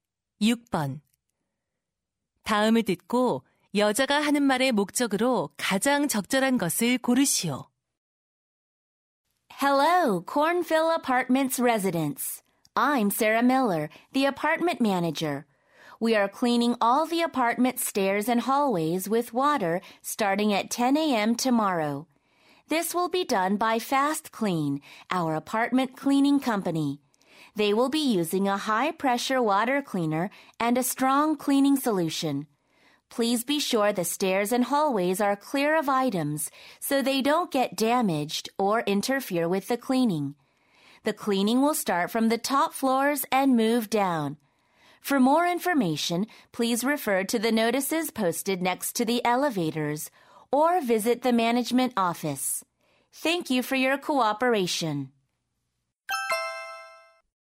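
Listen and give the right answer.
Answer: 계단과 복도 물청소 일정을 안내하고 물건을 치워 달라고 요청하려고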